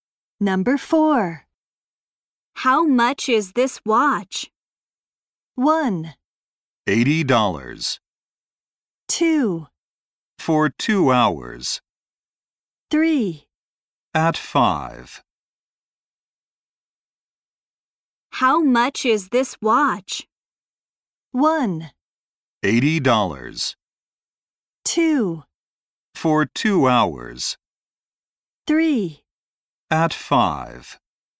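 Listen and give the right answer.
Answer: 1: $80.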